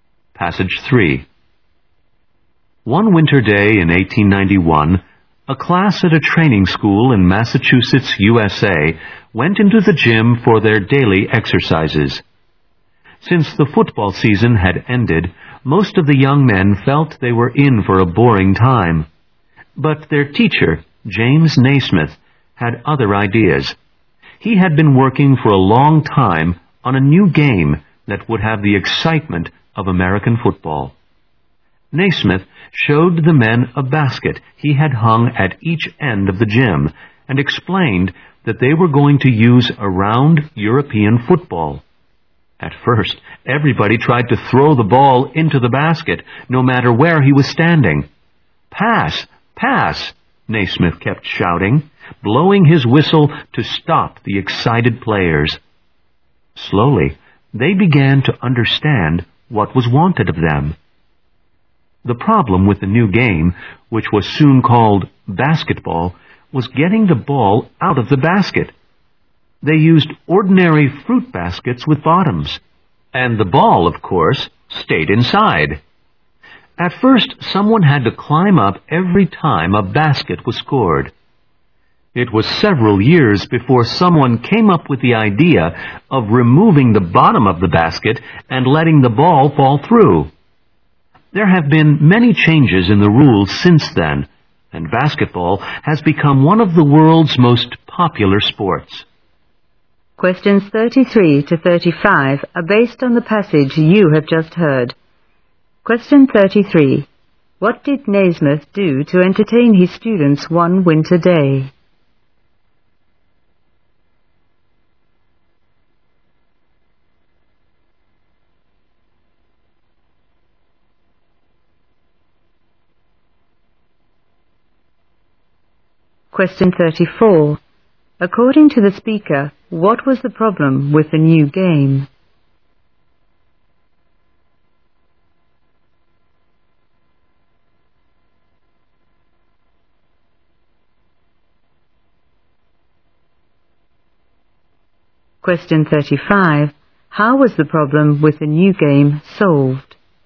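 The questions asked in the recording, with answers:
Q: What did Naismith do to entertain his students one winter day?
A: He introduced a new game (basketball).

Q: According to the speaker, what was the problem with the new game?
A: Getting the ball out of the basket.

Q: How was the problem with the new game solved?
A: By removing the bottom of the basket.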